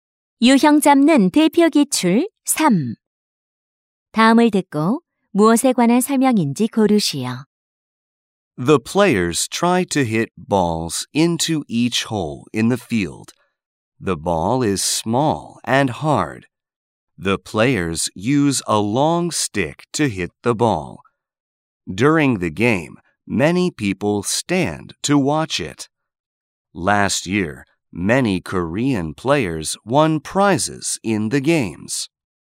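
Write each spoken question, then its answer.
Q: 다음을 듣고 무엇에 관한 설명인지 고르시오.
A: 골프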